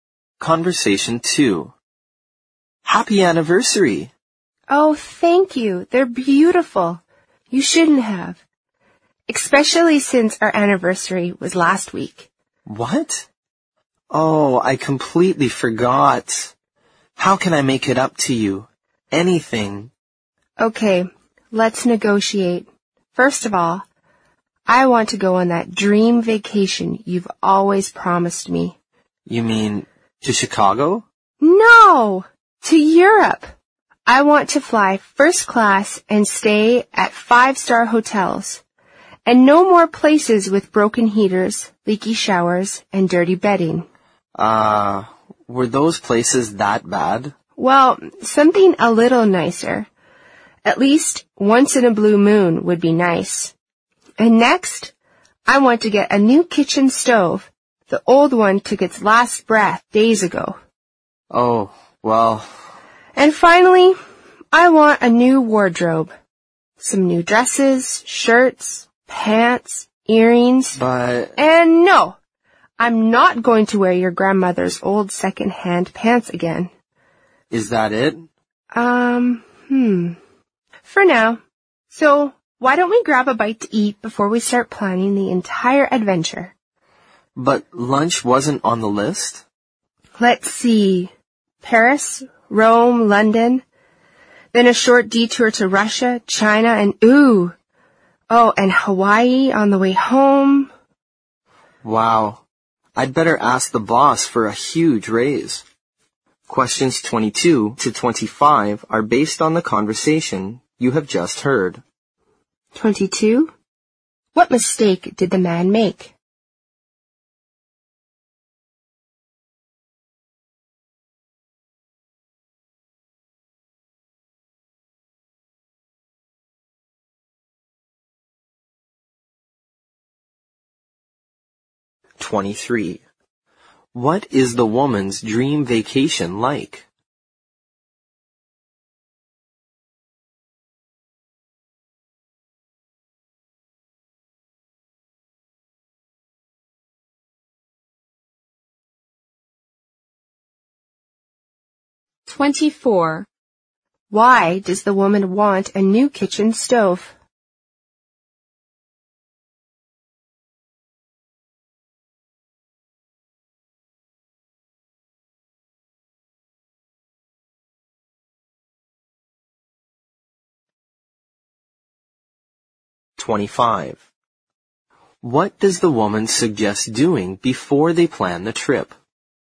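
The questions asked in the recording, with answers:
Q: What mistake did the man make?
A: He forgot their anniversary.

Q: What is the woman's dream vacation like?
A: A trip to Europe, flying first class and staying at 5-star hotels.

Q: Why does the woman want a new kitchen stove?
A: The old one stopped working.

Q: What does the woman suggest doing before they plan the trip?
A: Getting something to eat.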